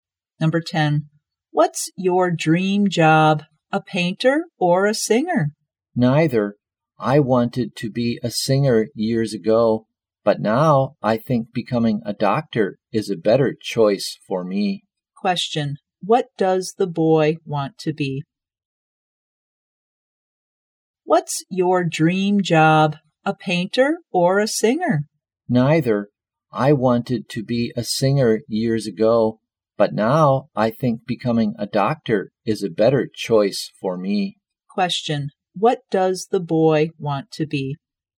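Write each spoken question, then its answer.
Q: What does the boy want to be?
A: A doctor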